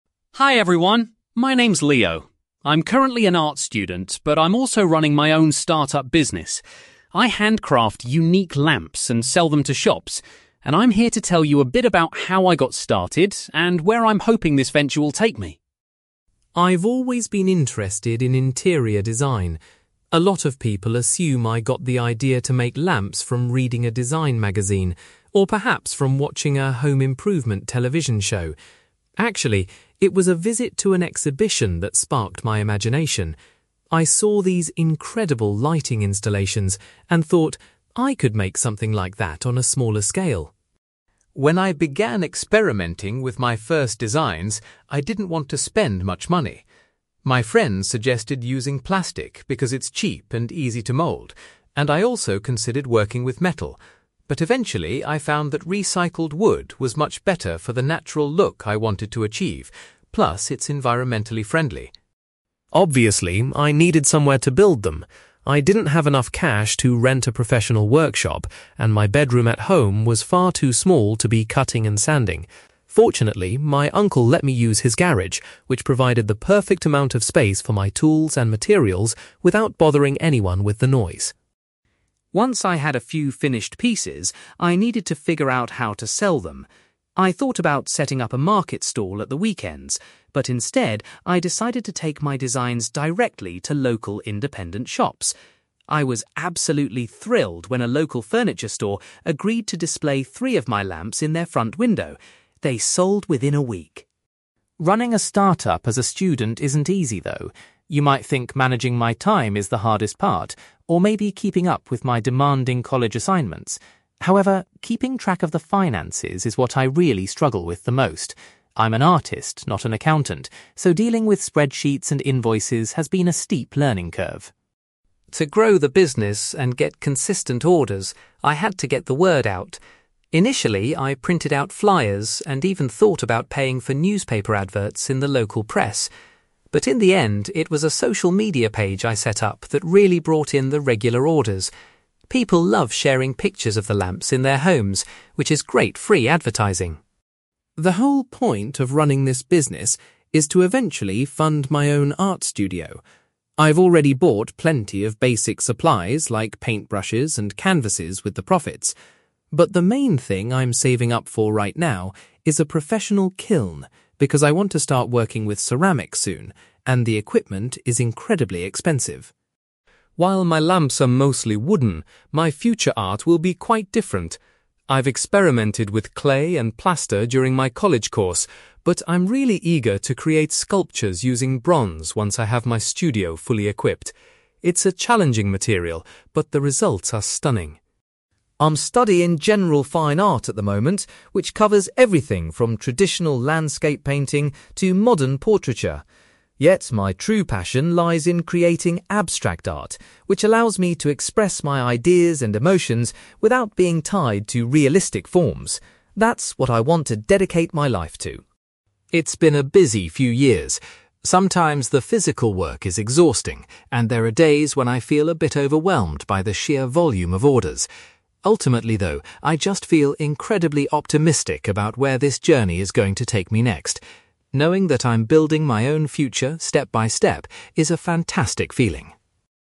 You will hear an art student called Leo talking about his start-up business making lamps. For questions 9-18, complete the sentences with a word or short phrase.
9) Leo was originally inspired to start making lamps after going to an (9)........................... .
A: exhibition

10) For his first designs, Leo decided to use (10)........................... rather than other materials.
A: recycled wood

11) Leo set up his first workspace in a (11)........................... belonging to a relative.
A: garage

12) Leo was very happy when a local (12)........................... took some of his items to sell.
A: furniture store

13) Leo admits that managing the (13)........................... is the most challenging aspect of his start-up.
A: finances

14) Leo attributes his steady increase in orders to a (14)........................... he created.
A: social media page

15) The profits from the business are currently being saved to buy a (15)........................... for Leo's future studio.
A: kiln

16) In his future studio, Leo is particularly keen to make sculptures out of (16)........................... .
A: bronze

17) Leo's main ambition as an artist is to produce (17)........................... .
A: abstract art

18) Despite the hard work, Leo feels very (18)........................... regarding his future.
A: optimistic

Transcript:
Leo: Hi everyone, my name's Leo. I'm currently an art student, but I'm also running my own start-up business. I handcraft unique lamps and sell them to shops, and I'm here to tell you a bit about how I got started and where I'm hoping this venture will take me.
I've always been interested in interior design. A lot of people assume I got the idea to make lamps from reading a design magazine, or perhaps from watching a home improvement television show. Actually, it was a visit to an exhibition that sparked my imagination. I saw these incredible lighting installations and thought, 'I could make something like that on a smaller scale'.
When I began experimenting with my first designs, I didn't want to spend much money. My friends suggested using plastic because it's cheap and easy to mould, and I also considered working with metal. But eventually, I found that recycled wood was much better for the natural look I wanted to achieve, plus it's environmentally friendly.
Obviously, I needed somewhere to build them. I didn't have enough cash to rent a professional workshop, and my bedroom at home was far too small to be cutting and sanding. Fortunately, my uncle let me use his garage, which provided the perfect amount of space for my tools and materials without bothering anyone with the noise.
Once I had a few finished pieces, I needed to figure out how to sell them. I thought about setting up a market stall at the weekends, but instead, I decided to take my designs directly to local independent shops. I was absolutely thrilled when a local furniture store agreed to display three of my lamps in their front window. They sold within a week!
Running a start-up as a student isn't easy, though. You might think managing my time is the hardest part, or maybe keeping up with my demanding college assignments. However, keeping track of the finances is what I really struggle with the most. I'm an artist, not an accountant, so dealing with spreadsheets and invoices has been a steep learning curve.
To grow the business and get consistent orders, I had to get the word out. Initially, I printed out flyers and even thought about paying for newspaper adverts in the local press. But in the end, it was a social media page I set up that really brought in the regular orders. People love sharing pictures of the lamps in their homes, which is great free advertising.
The whole point of running this business is to eventually fund my own art studio. I've already bought plenty of basic supplies like paintbrushes and canvases with the profits. But the main thing I'm saving up for right now is a professional kiln, because I want to start working with ceramics soon and the equipment is incredibly expensive.
While my lamps are mostly wooden, my future art will be quite different. I've experimented with clay and plaster during my college course, but I'm really eager to create sculptures using bronze once I have my studio fully equipped. It's a challenging material, but the results are stunning.
I'm studying general fine art at the moment, which covers everything from traditional landscape painting to modern portraiture. Yet, my true passion lies in creating abstract art, which allows me to express my ideas and emotions without being tied to realistic forms. That's what I want to dedicate my life to.
It's been a busy few years. Sometimes the physical work is exhausting, and there are days when I feel a bit overwhelmed by the sheer volume of orders. Ultimately, though, I just feel incredibly optimistic about where this journey is going to take me next. Knowing that I'm building my own future step by step is a fantastic feeling.

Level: B2